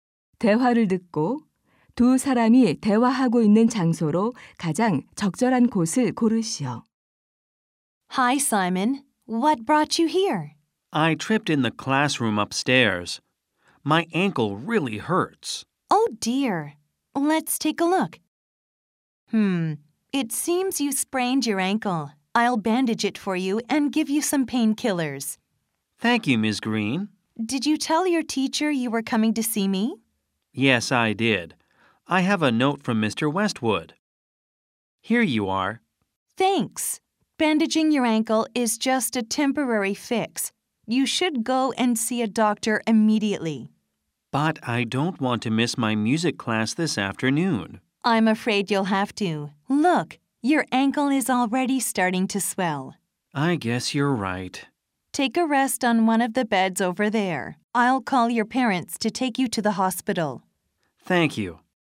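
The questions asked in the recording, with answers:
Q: 대화를 듣고 두 사람이 대화하고 있는 장소로 가장 적절한 곳을 고르시오.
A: 보건실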